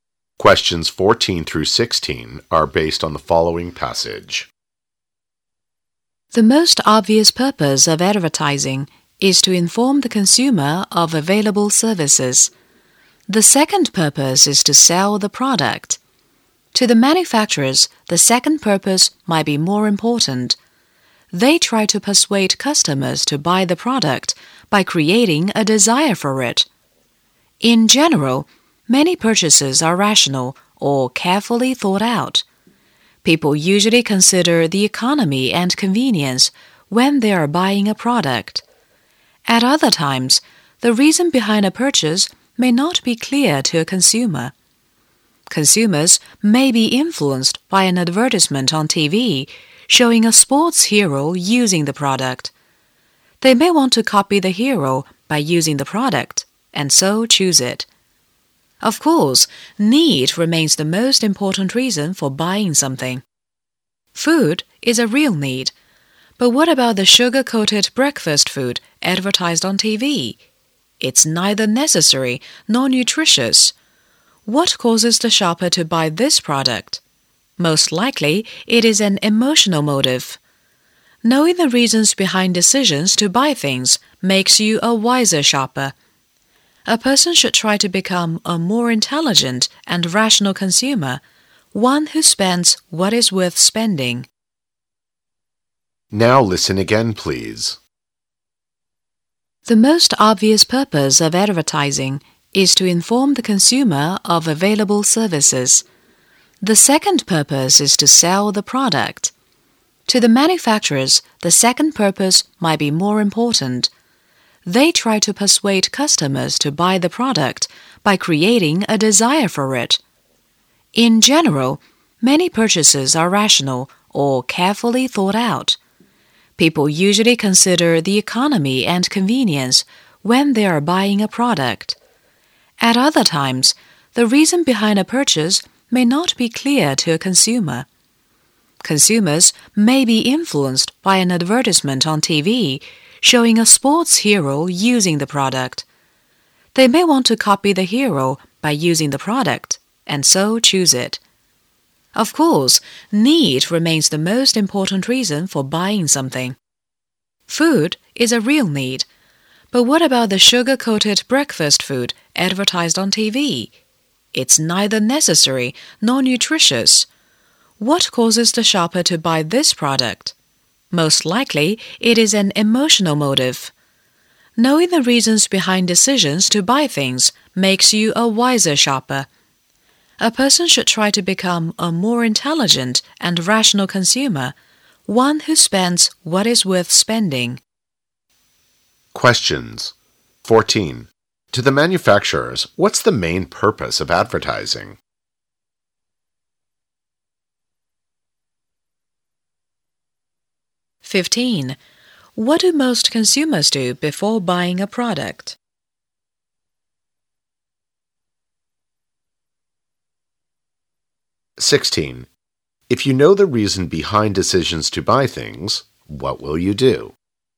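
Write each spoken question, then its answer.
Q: To the manufacturers, what's the main purpose of advertising?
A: To sell the product

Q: What do most consumers do before buying a product?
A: They consider economy and convenience

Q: If you know the reason behind decisions to buy things, what will you do?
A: Become a wiser shopper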